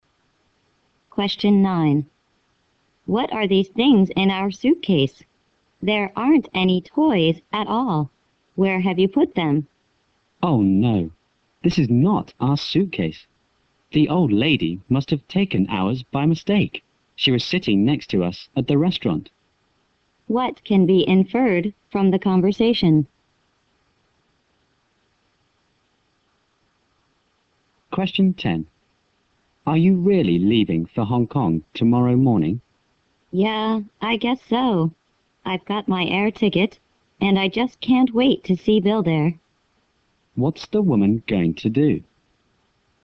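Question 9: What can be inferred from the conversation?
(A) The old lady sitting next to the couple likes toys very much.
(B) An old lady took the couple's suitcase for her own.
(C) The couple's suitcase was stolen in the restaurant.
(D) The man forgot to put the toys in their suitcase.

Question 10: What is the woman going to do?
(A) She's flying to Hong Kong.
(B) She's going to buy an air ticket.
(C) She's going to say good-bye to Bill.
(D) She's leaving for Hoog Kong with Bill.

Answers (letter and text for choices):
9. (B) An old lady took the couple's suitcase for her own.
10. (A) She's flying to Hong Kong.

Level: 大学英语四级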